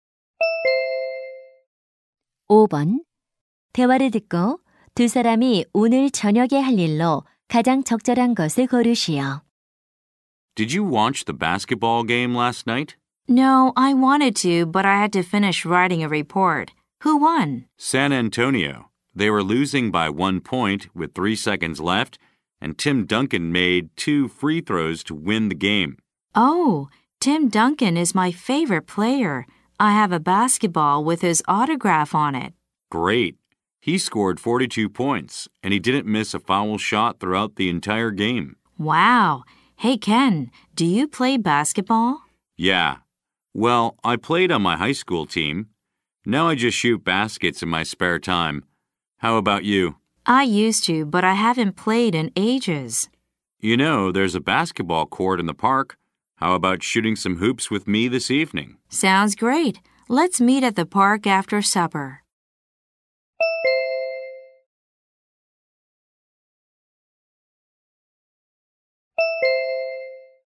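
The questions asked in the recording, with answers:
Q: 대화를 듣고 두 사람이 오늘 저녁에 할 일로 가장 적절한 것을 고르시오.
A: 공원에서 함께 농구하기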